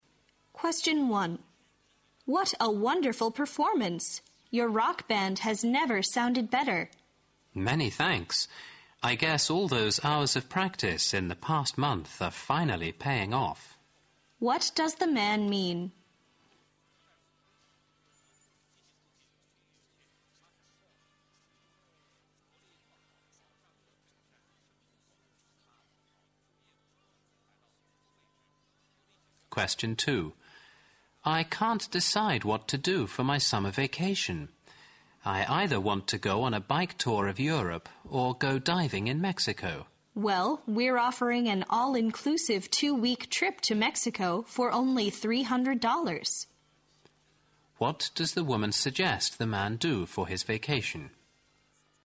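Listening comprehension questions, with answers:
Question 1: What does the man mean?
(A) The rock band needs more hours of practice.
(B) The rock band is going to play here for a month.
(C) Their hard work has resulted in a big success.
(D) He appreciates the woman's help with the band.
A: Their hard work has resulted in a big success.

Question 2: What does the woman suggest the man do for his vacation?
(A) Go on a diving tour in Europe.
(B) Add 300 dollars to his budget.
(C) Travel overseas on his own.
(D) Join a package tour to Mexico.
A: Join a package tour to Mexico.

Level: 六级

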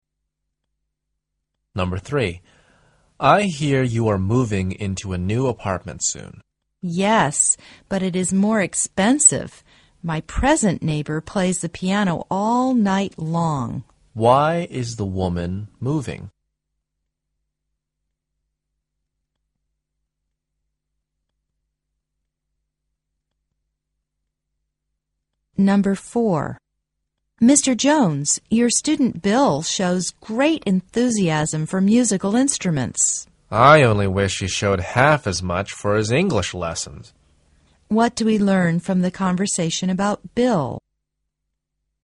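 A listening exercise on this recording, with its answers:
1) Why is the woman moving?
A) She can't put up with the noise.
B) She wants to save money to buy a piano.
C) The present apartment is too expensive.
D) She has found a job a neighbouring area.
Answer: She can't put up with the noise.

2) What do we learn from the conversation about Bill?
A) He is not very enthusiastic about his English lessons.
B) He has made great progress in his English.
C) He is a student of the music department.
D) He is not very interested in English songs.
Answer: He is not very enthusiastic about his English lessons.

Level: 四级

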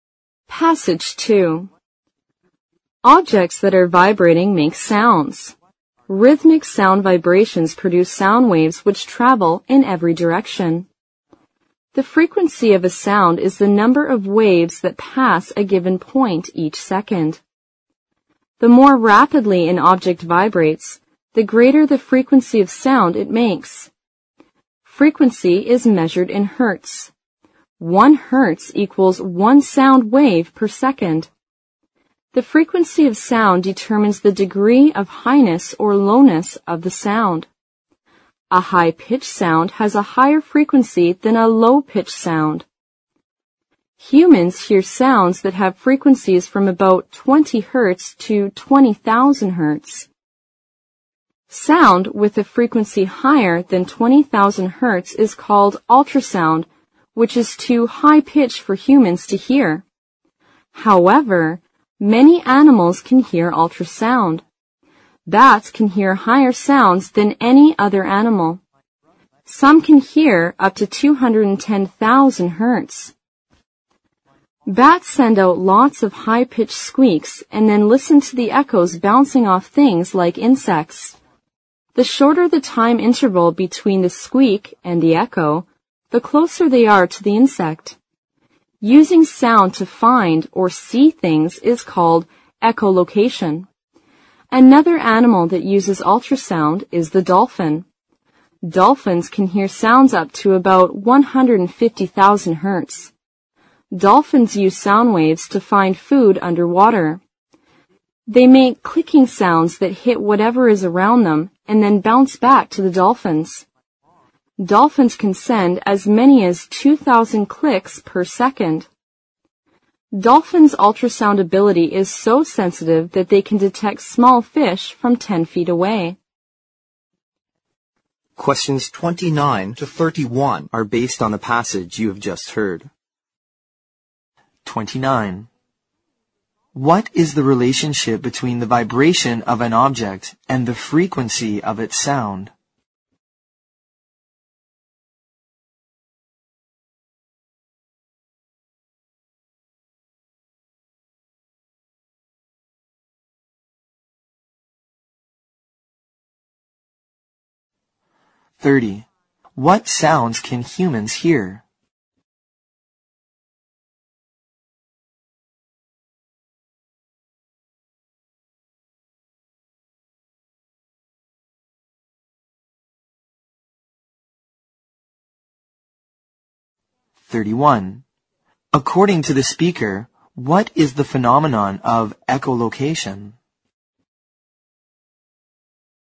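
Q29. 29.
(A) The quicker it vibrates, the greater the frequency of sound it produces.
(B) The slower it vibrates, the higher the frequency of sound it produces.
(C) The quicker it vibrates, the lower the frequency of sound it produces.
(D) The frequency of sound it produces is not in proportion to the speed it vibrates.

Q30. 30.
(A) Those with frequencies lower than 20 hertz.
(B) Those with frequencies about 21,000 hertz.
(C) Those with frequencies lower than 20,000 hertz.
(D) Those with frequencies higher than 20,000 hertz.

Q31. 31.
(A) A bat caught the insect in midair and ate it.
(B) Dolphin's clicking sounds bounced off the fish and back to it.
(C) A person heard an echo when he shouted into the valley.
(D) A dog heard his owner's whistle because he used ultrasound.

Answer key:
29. The quicker it vibrates, the greater the frequency of sound it produces.
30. Those with frequencies lower than 20,000 hertz.
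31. Dolphin's clicking sounds bounced off the fish and back to it.

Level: 六级

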